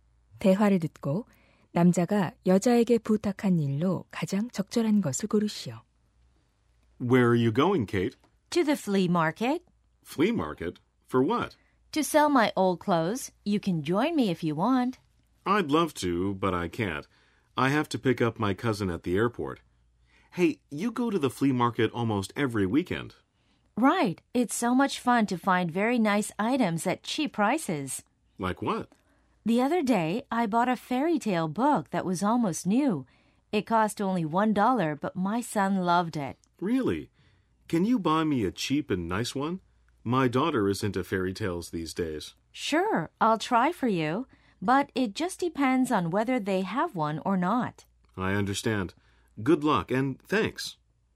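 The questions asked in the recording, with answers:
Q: 대화를 듣고 남자가 여자에게 부탁한 일로 가장 적절한 것을 고르시오.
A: 벼룩시장에서 싸고 좋은 동화책 사다 주기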